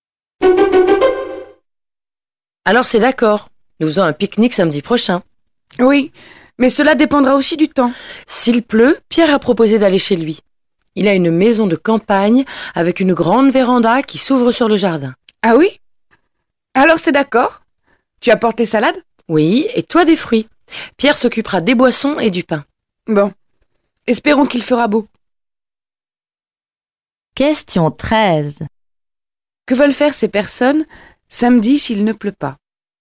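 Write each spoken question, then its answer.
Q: Que veulent faire ces personnes samedi s'il ne pleut pas?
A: Un pique-nique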